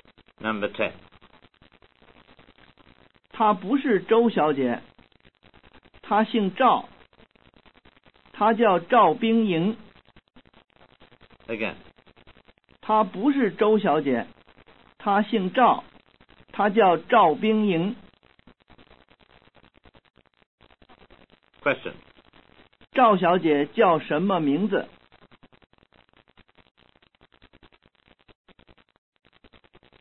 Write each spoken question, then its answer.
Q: 赵小姐叫什么名字?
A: 她叫冰莹。